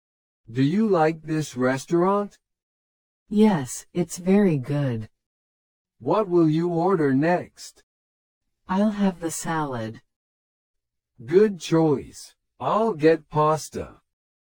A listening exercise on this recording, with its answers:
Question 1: What will the woman eat?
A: Salad.

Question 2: What will the man order?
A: Pasta.

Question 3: Does the woman like the restaurant?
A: Yes, she does.

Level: 初級者用